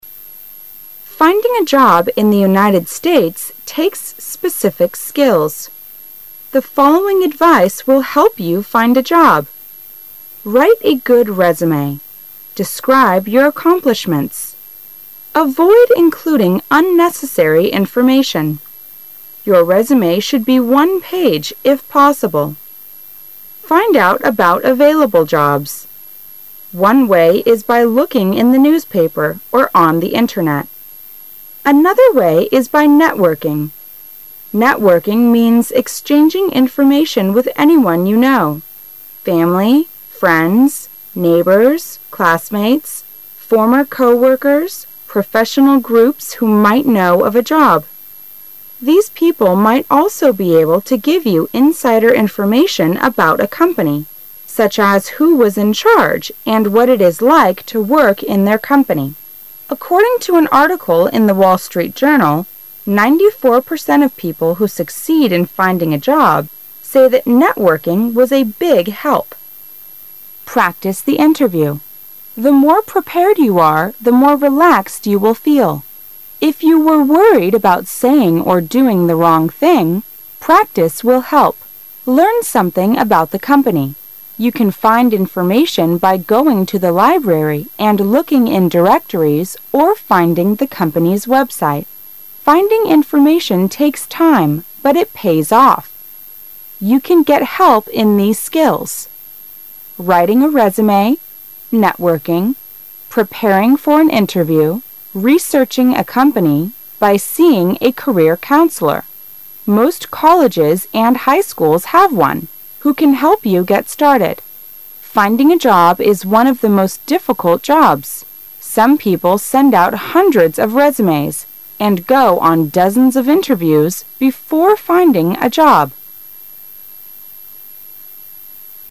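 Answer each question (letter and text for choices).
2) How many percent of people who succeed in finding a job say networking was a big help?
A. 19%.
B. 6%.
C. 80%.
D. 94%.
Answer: D. 94%.

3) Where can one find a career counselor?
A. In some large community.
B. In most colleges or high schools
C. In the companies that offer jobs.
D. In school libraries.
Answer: B. In most colleges or high schools

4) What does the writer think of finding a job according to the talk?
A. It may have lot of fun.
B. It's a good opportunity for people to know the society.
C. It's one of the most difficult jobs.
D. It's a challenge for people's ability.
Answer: C. It's one of the most difficult jobs.

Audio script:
[解析] 17-20 Finding a job in the United States takes specific skills. The following advice will help you find a job. Write a good resume. Describe your accomplishments. Avoid including unnecessary information. 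Your resume should be one page if possible. Find out about available jobs. One way is by looking in the newspaper or on the Internet. Another way is by networking. Networking means exchanging information with anyone you know: family, friends, neighbors, classmates, former coworkers, professional groups who might know of a job. These people might also be able to give you insider information about a company, such as who was in charge and what it is like to work in their company. According to an article in the Wall Street Journal,94 percent of people who succeed in finding a job say that networking was a big help. Practice the interview. The more prepared you are, the more relaxed you will feel. If you were worried about saying or doing the wrong thing, practice will help. Learn something a bout the company. You can find information by going to the library and looking in directories or finding the company's website. 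Finding information takes time, but it pays off. You can get help in these skills :writing a resume, networking, preparing for an interview, researching a company, by seeing a career counselor. Most colleges and high schools have one who can help you get started. Finding. a job is one of the most difficult jobs. Some people send out hundreds of resumes and go on dozens of inter views before finding a job.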